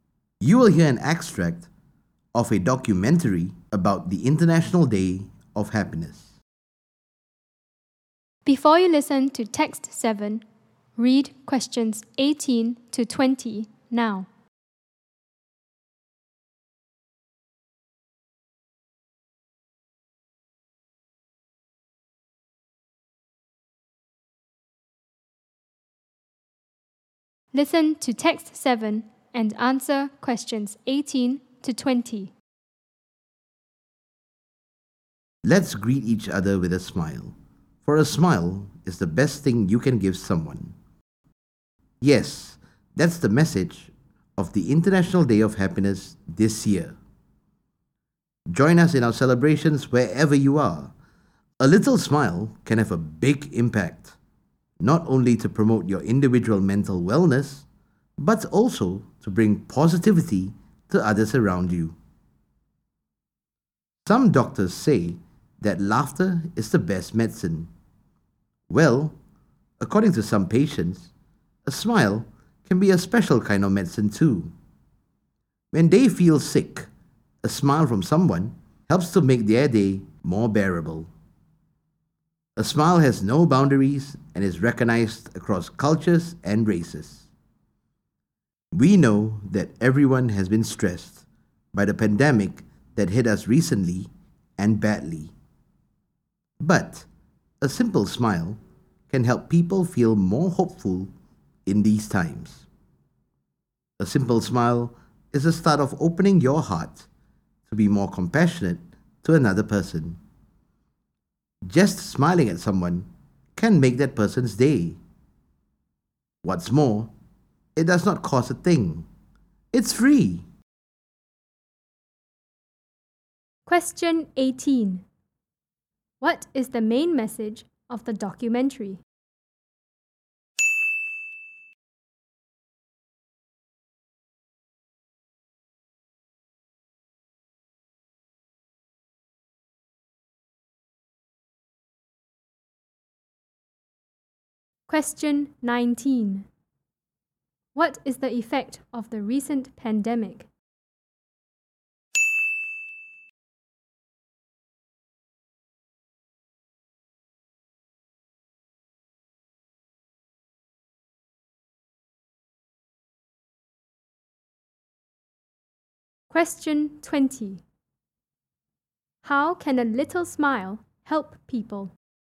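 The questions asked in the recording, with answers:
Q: What is the main message of the documentary?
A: Greet each other with a smile; a smile is the best thing you can give someone.

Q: What is the effect of the recent pandemic?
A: Everyone has been stressed.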